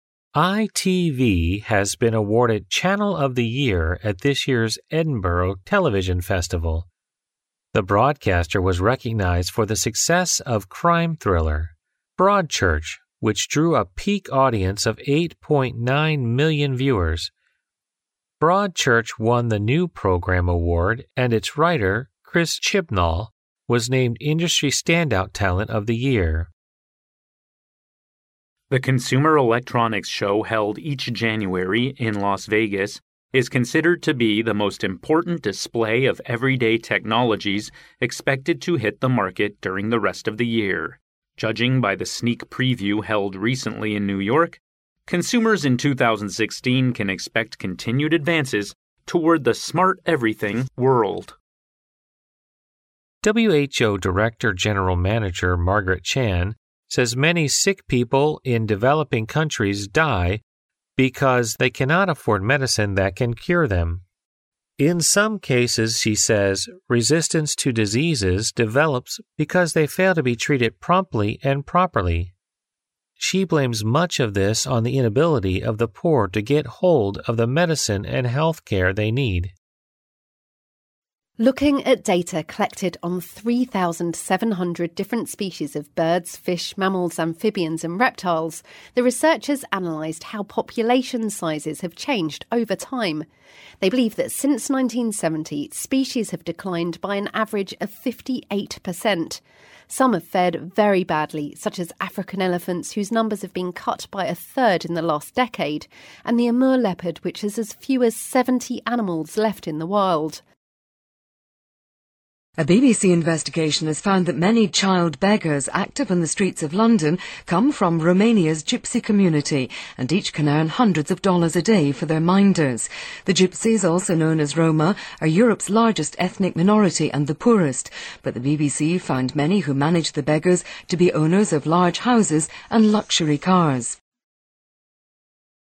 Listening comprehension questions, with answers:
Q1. Which award did the thriller Broadchurch win? ______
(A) Channel of the Year.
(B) New Programme Award.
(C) Industry Standout Talent of the Year.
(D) The Most Successful Crime Thriller.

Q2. Where is the Consumer Electronics Show held each year? ______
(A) New York.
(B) Las Vegas.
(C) Washington D.C.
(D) Around the world.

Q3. What is responsible for the death of many people in developing countries? ______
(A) The development of resistance to diseases.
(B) The difficulty to cure new emerging diseases.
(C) The inability of the poor to afford medicine.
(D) The useless medicine to cure the diseases.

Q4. What animals have suffered more than others according to the research? ______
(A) African elephants and Amur leopard.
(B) Around 3,700 different species of birds.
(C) Birds, fish, mammals, amphibians and reptiles.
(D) The many different species of African animals.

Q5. How much money can each child beggar earn a day for their minders? ______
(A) Dozens of dollars.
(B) Hundreds of dollars.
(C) A dozen or so dollars.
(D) A few dollars.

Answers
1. (B) New Programme Award.
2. (B) Las Vegas.
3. (C) The inability of the poor to afford medicine.
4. (A) African elephants and Amur leopard.
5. (B) Hundreds of dollars.

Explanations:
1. 录音中听到"Broadchurch won the New Programme award",由此可知,Broadchurch获得的是New Programme award,故答案为B项。
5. 新闻第二句话提到每一个儿童乞丐一天可以乞讨到hundreds of dollars。

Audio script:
[听力原文] ITV has been awarded Channel of the Year at this year's Edinburgh television festival. The broadcaster was recognized for the success of crime thriller Broadchurch, which drew a peak audience of 8.9 million viewers. Broadchurch won the New Programme award and its writer Chris Chibnall was named Industry Standout Talent of the Year.
[听力原文] The Consumer Electronics Show held each January in Las Vegas is considered to be the most important display of everyday technologies expected to hit the market during the rest of the year. Judging by the sneak preview held recently in New York, consumers in 2016 can expect continued advances toward the "smart everything" world.
[听力原文] WHO Director-General Margaret Chan says many sick people in developing countries die because they cannot afford medicine that can cure them. In some cases, she says, resistance to diseases develops because they fail to be treated promptly and properly. She blames much of this on the inability of the poor to get hold of the medicine and health care they need.
A
[听力原文] Looking at data collected on 3,700 different species of birds, fish, mammals, amphibians and reptiles, the researchers analysed how population sizes have changed over time. They believe that since 1970, species have declined by an average of 58%. Some have fared very badly, such as African elephants, whose numbers have been cut by a third in the last decade, and the Amur leopard, which is as few as 70 animals left in the world.
[听力原文] A BBC investigation has found that many child beggars active on the streets of London come from Romania's Gypsy community and each can earn hundreds of dollars a day for their minders. The Gypsies, also known as Roma, are Europe's largest ethnic minority and the poorest, but the BBC found many who manage the beggars to be owners of large houses and luxury cars.

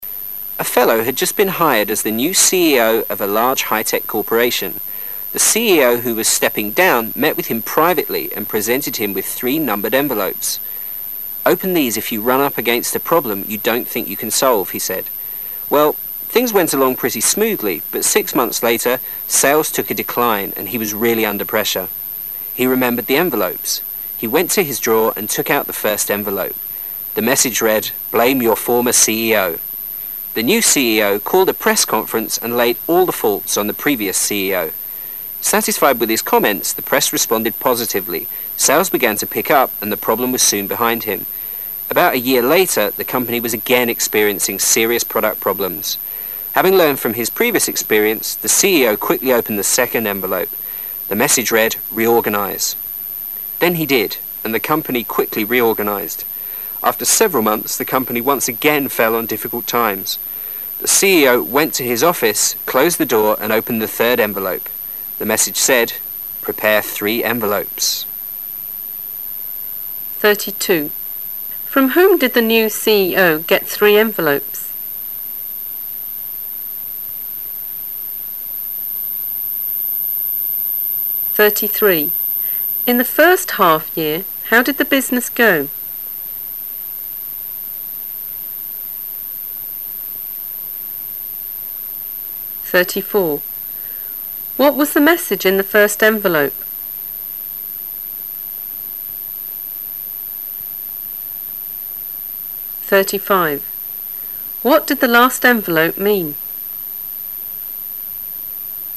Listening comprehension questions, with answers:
What did the last envelope mean?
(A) More envelopes should be prepared.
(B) He should write more letters.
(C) He should show more respect for his employees.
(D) He should consider resigning.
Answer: (D) He should consider resigning.

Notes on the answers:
题目询问最后一封信是什么意思。这是一道推理题,先要听到最后一封信的内容是"Prepare three envelopes",可推断其意思是和前任CEO一样,为下任CEO准备三封信,然后下台。因此选项 D(他该考虑离职)为正确答案。 [点睛]选项A(应该准备更多封信)和B(他应该写更多信)意思一致,首先可以排除。选项C(他应该更尊重雇员)没提到,且与"准备三封信"没有任何关系。

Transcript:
[解析] 32-35 A fellow had just been hired as the new CEO of a large high-tech corporation. [32] The CEO who was stepping down met with him privately and presented him with three numbered envelopes. "Open these if you run up against a problem you don't think you can solve," he said. Well, [33] things went along pretty smoothly, but six months later, sales took a decline and he was really under the pressure. He remembered the envelopes. He went to his drawer and took out the first envelope. The message read, [34] "Blame your former CEO." The new CEO called a press conference and laid all the faults on the previous CEO. Satisfied with his comments, the press responded positively, sales began to pick up and the problem was soon behind him. About a year later, the company was again experiencing serious product problems. Having learned from his previous experience, the CEO quickly opened the second envelope. Then he did, and the company quickly reorganized. After several months, the company once again fell on difficult times. The CEO went to his office, closed the door and opened the third envelope. The message said, [35] "Prepare three envelopes". 32.From whom did the new CEO get three envelopes?

